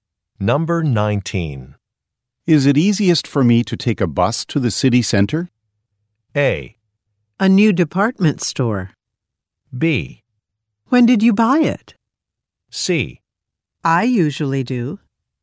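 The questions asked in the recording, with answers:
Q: Is it easiest for me to take a bus to the city center?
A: C: I usually do.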